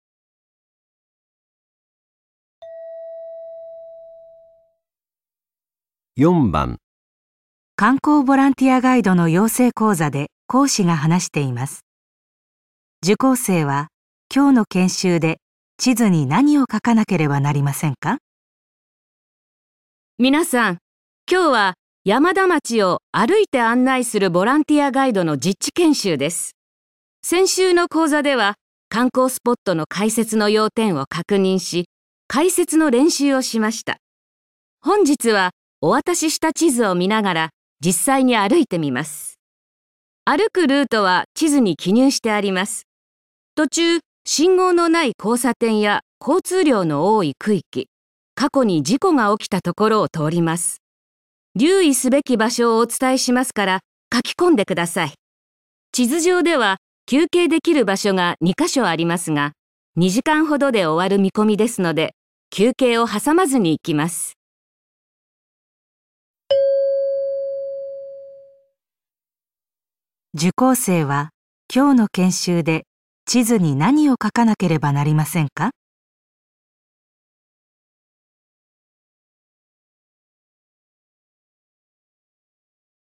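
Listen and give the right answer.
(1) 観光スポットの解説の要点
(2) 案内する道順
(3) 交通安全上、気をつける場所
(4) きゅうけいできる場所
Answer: (3) 交通安全上、気をつける場所

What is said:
本日はお渡しした地図を見ながら実際に歩いてみます。歩 くルートは地図に記入してあります。 途中、 信号のない交差点や交通量の多い区域、過去に事故が起きたところを通ります。留意すべき場所をお伝えしますから描き込んでください。 地図上では休憩できる場所が2ヵ所 ありますが、2時間ほどで終わる見込みですので休憩を挟まずに行きます。
受講生は今日の研修で地図に何を書かなければなりませんか。

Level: N1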